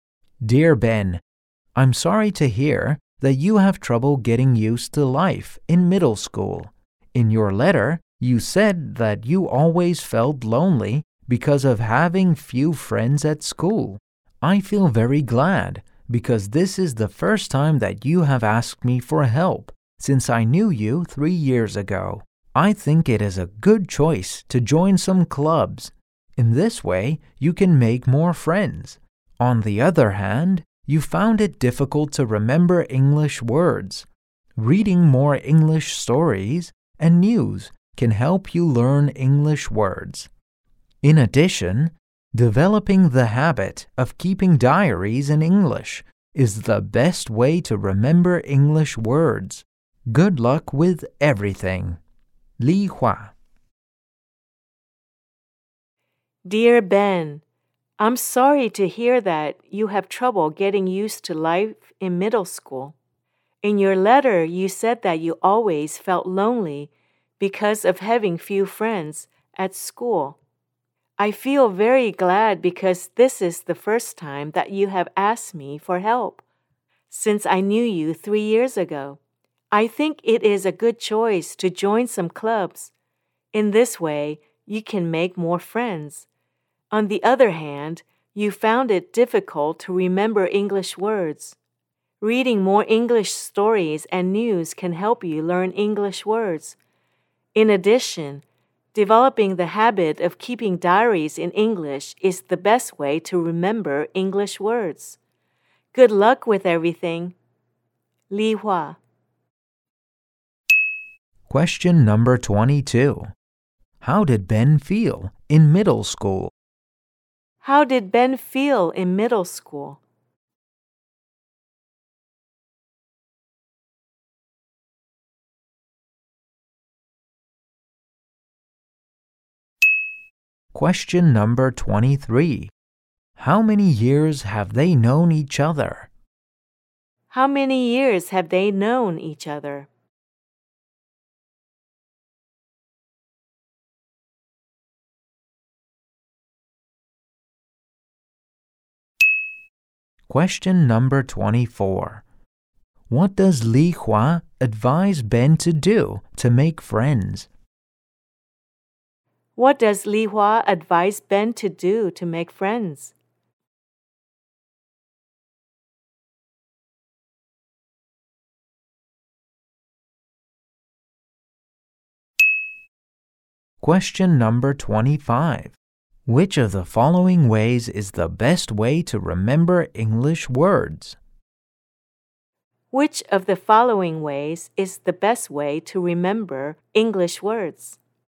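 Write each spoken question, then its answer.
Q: How did Ben feel in middle school?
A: Lonely

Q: How many years have they known each other?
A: Three years

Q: What does Li Hua advise Ben to do to make friends?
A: Join some clubs

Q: Which of the following ways is the best way to remember English words?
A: Keeping diaries in English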